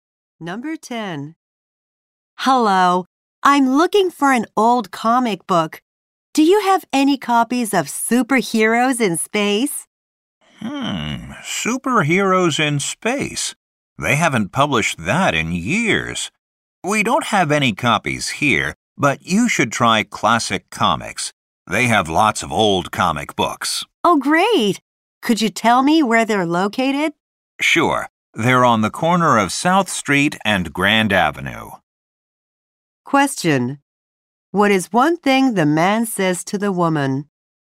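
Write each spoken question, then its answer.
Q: What is one thing the man says to the woman?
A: She should try Classic Comics for old comic books.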